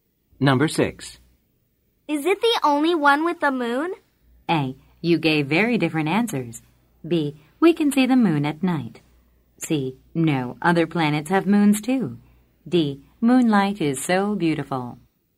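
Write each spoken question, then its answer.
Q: Is it the only one with the moon?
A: C: No, other planets have moons too.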